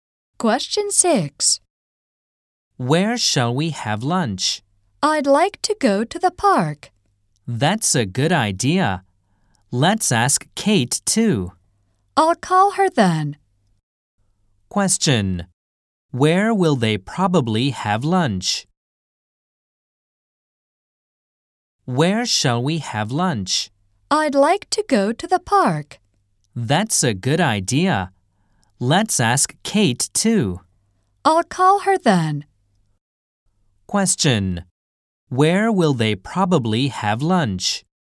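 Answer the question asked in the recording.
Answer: In the park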